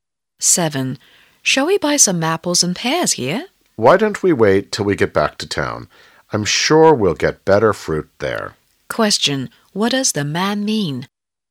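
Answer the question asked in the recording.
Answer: They should buy the fruit in town, where it is better.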